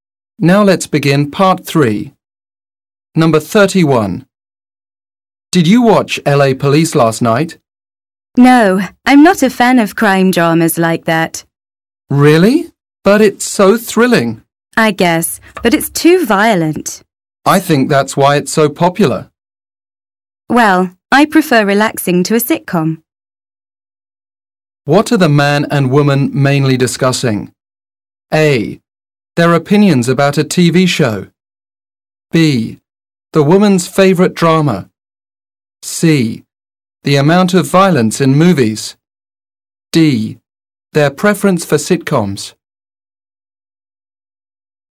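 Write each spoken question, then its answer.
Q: What are the man and woman mainly discussing?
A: A: Their opinions about a TV show.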